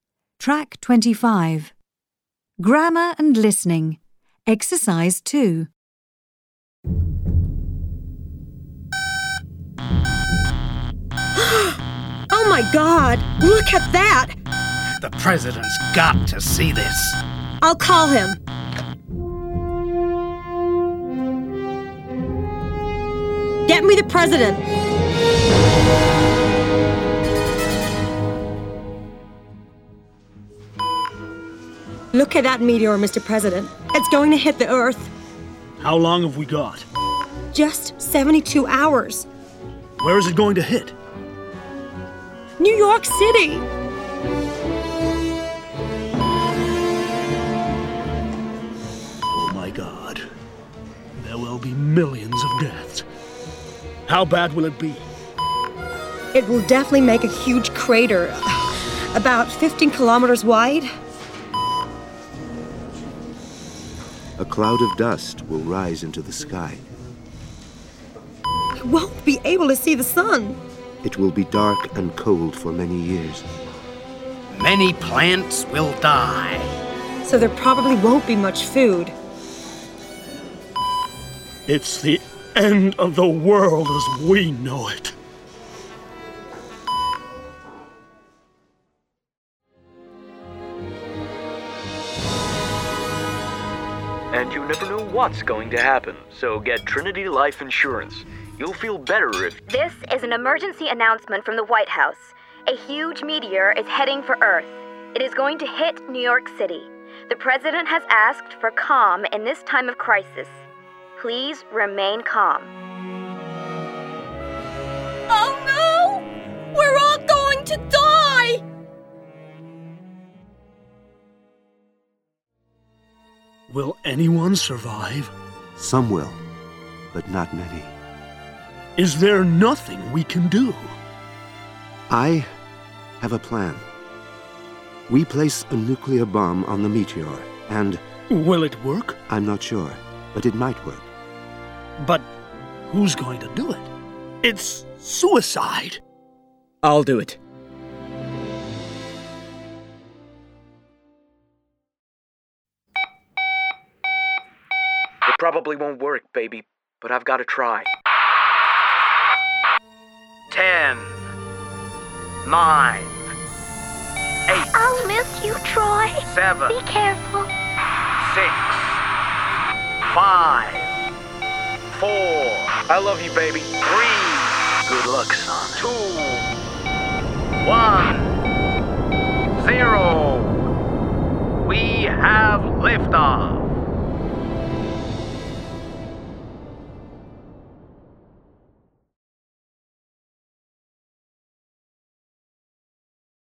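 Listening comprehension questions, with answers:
Read sentences 1–5. Then listen to the film script. Tick true and cross false.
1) The President is the first person to see the meteor.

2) There isn't much time to prepare for the impact.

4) The consequences of the meteor will not last a long time.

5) The plan is to destroy the meteor with a nuclear bomb.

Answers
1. F
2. T
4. F
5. T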